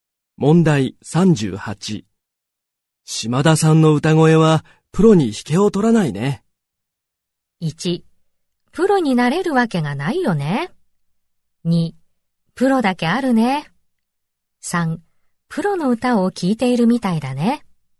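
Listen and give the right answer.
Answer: 3: プロの歌を聴いているみたいだね。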